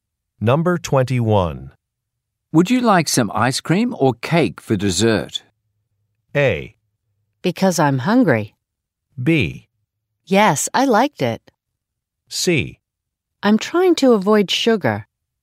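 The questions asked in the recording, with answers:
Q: Would you like some ice cream or cake for dessert?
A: C: I'm trying to avoid sugar.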